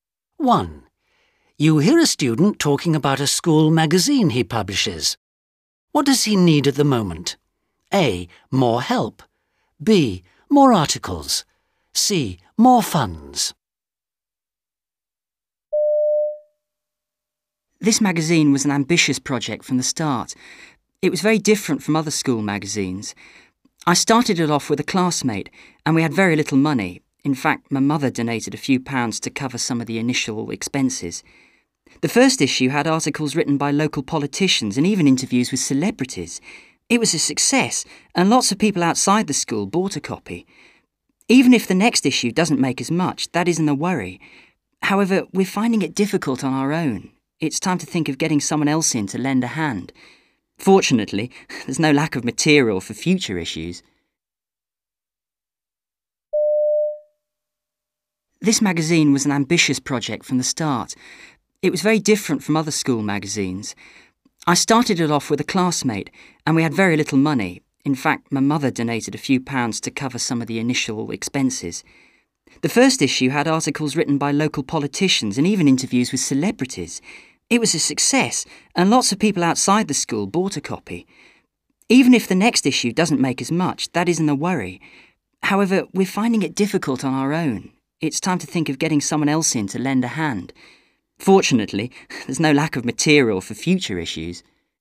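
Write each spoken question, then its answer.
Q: What does he need at the moment?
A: A: More help.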